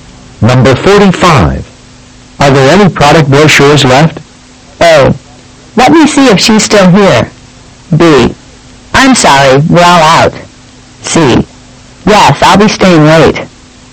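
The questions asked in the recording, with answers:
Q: Are there any product brochures left?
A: B: I'm sorry, we're all out.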